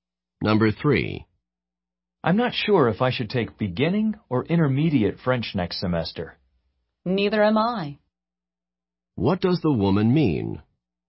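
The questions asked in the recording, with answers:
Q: What does the woman mean?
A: She is also unsure which French course to take.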